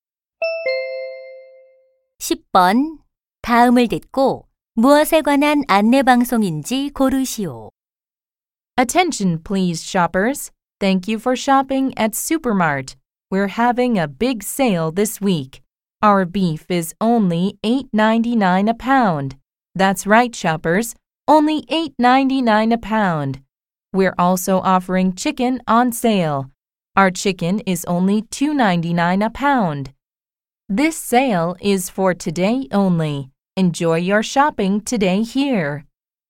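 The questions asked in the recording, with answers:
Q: 다음을 듣고 무엇에 관한 안내 방송인지 고르시오.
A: 슈퍼마켓 할인 판매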